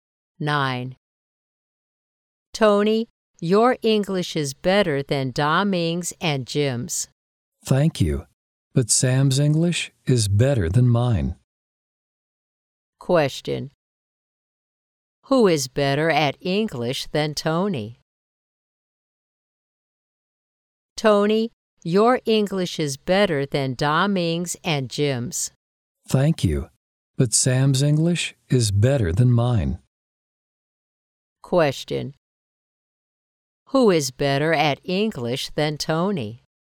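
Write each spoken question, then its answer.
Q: Who is better at English than Tony?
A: Sam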